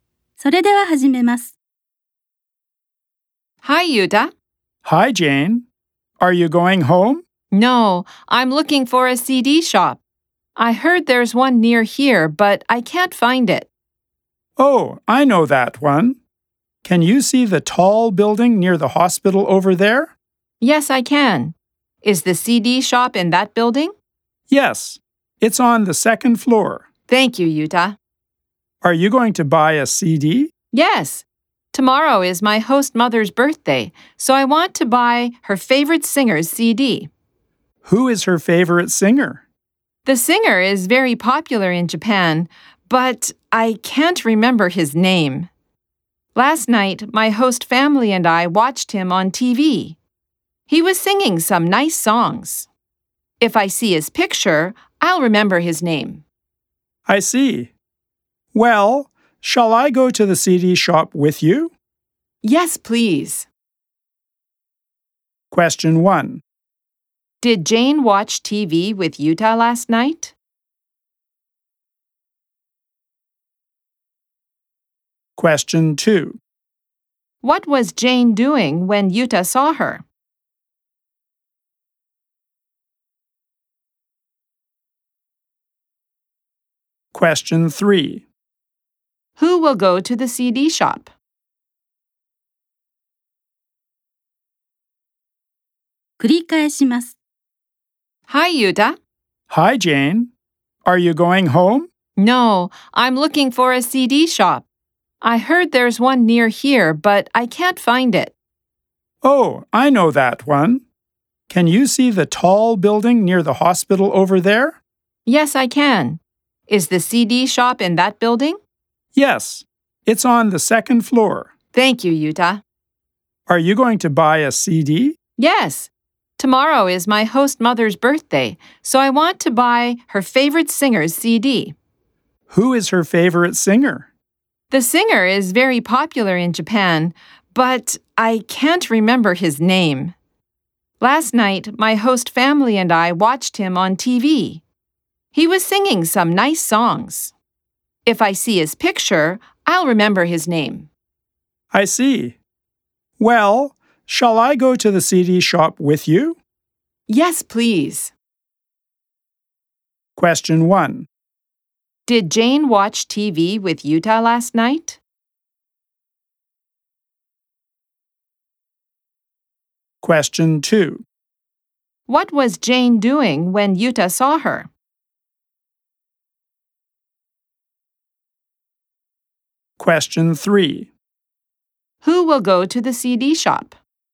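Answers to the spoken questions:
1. No, she didn't.
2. She was looking for a CD shop.
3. Jane and Yuta.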